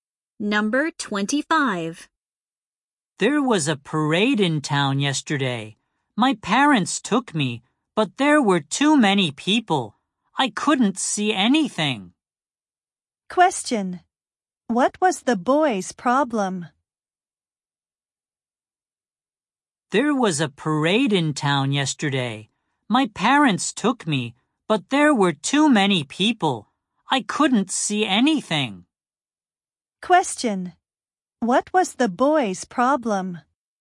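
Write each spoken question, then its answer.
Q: What was the boy's problem?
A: He couldn't see the parade because there were too many people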